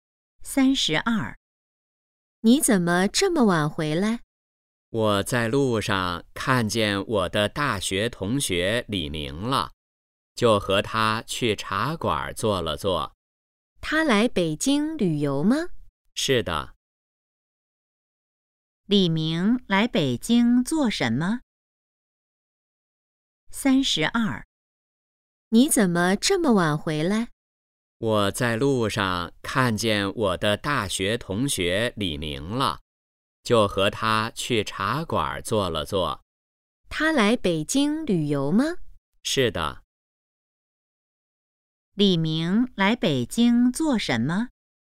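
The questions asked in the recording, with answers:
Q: 李明来北京做什么?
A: 旅游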